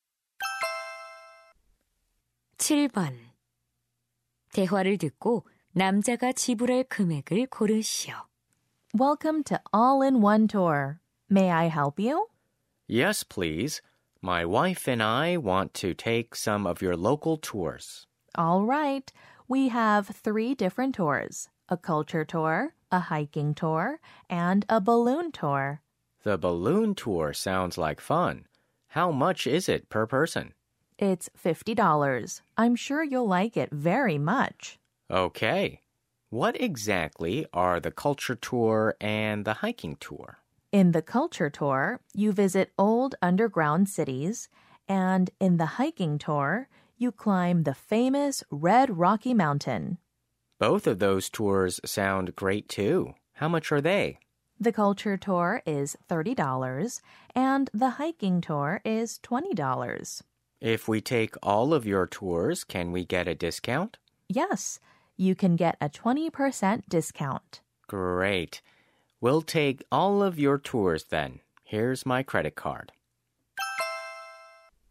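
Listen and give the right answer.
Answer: $160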